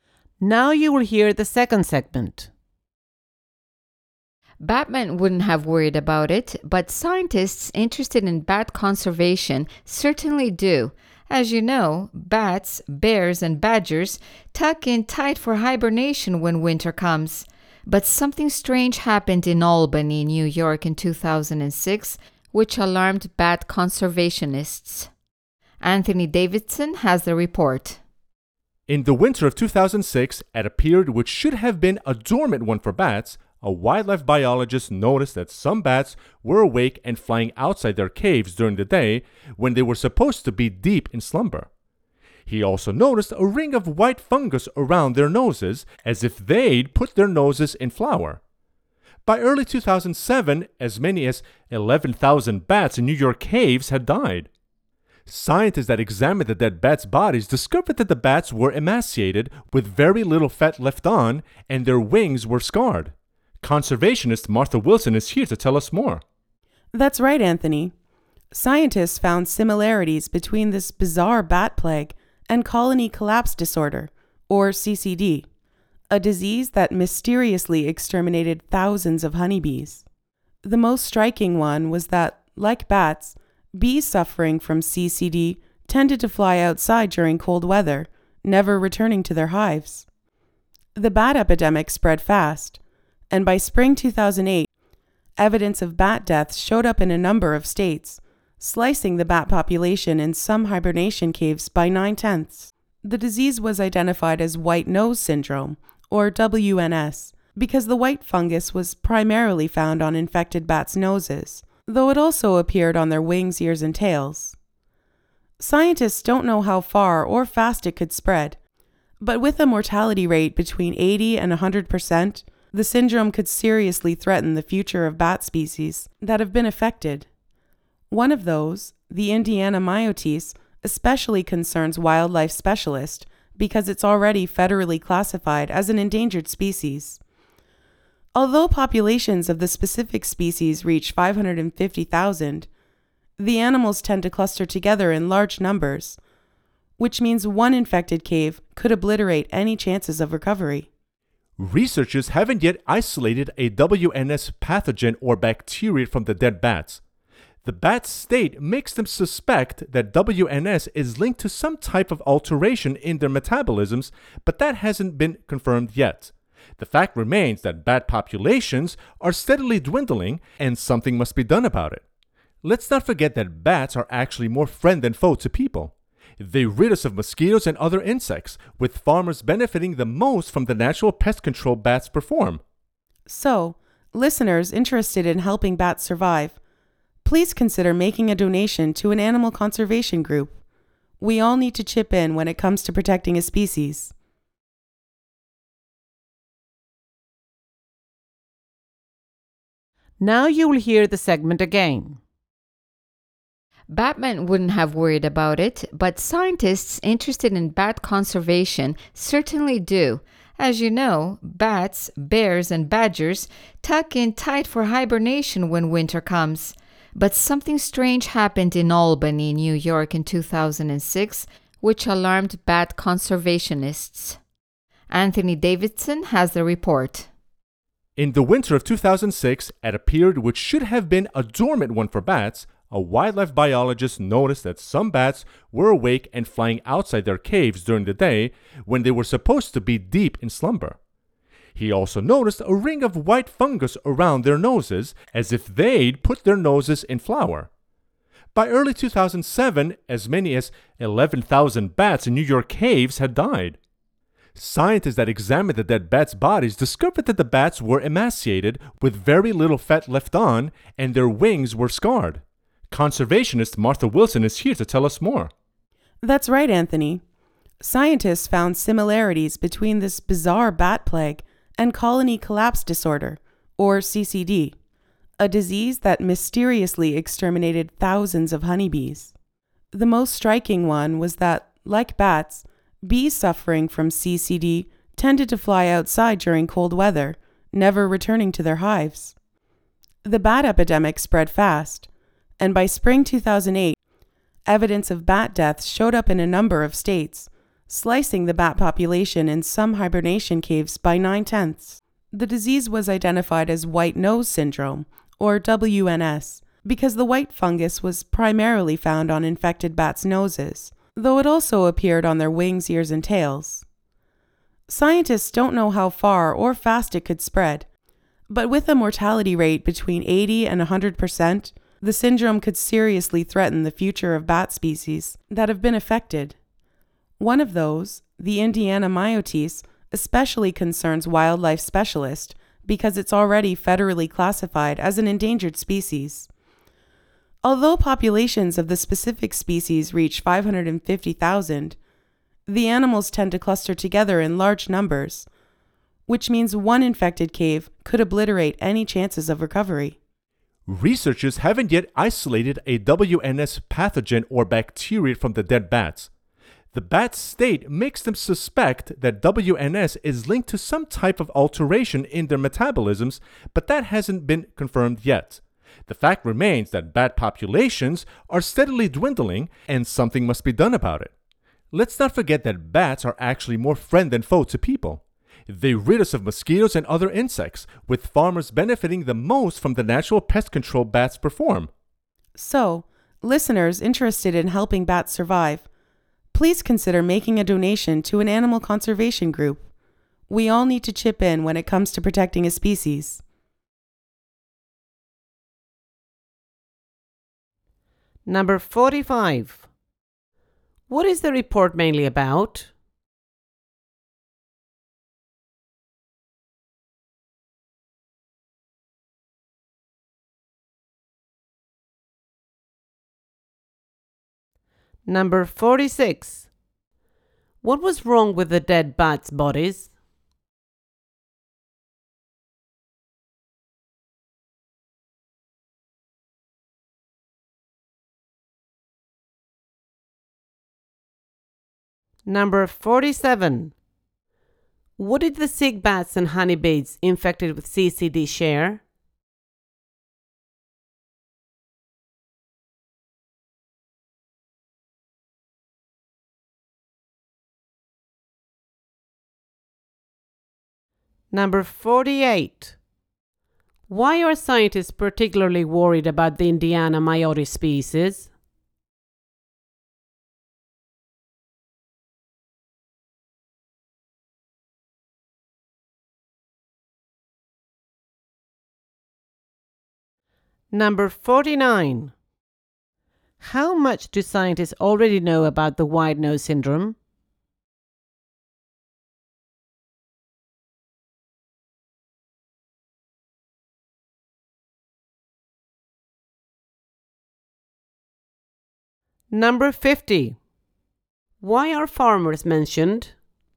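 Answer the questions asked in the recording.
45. A disease (white nose syndrome) that is killing bats
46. They were very thin, with little fat left, and their wings were scarred
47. They flew outside in cold weather
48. It is already endangered, and because the bats cluster together, one infected cave could wipe out any chance of recovery
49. Very little; the cause has not been found or confirmed
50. They benefit most from the pest control bats provide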